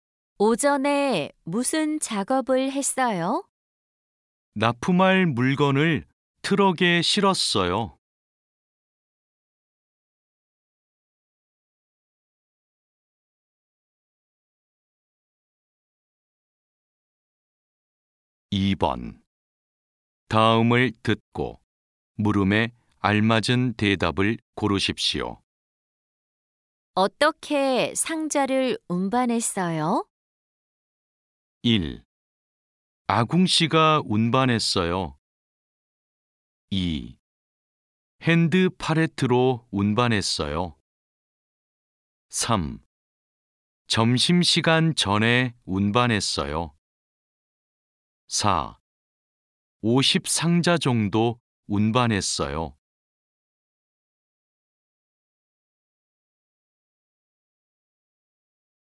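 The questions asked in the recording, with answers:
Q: 어떻게 상자를 운반했어요?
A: 2: 핸드 팔레트로 운반했어요.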